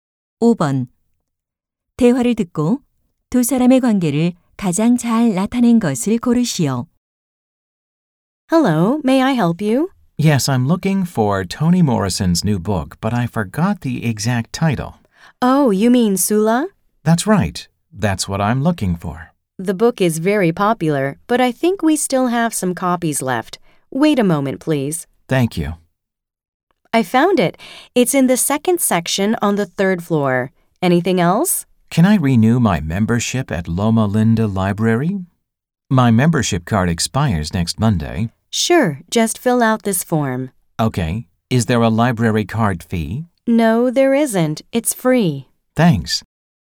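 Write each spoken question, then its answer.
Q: 대화를 듣고 두 사람의 관계를 가장 잘 나타낸 것을 고르시오.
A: 도서관 사서 - 도서관 이용자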